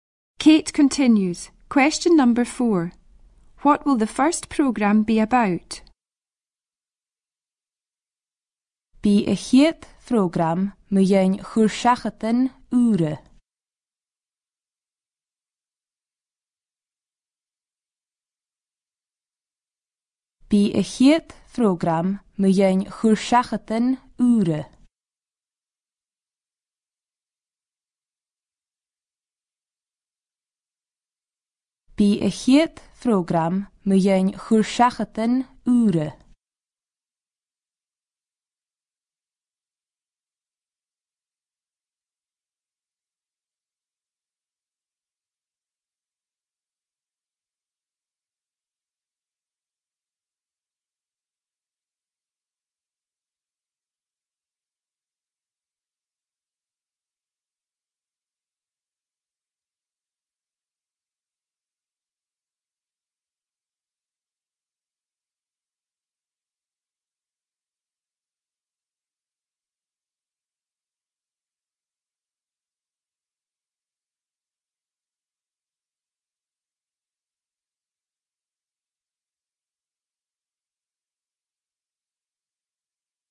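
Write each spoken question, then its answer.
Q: What will the first program be about?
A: New hobbies/pastimes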